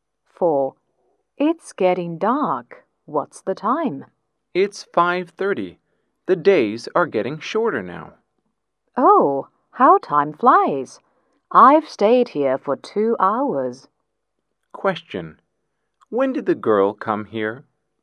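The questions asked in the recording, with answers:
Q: When did the girl come here?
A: At 3:30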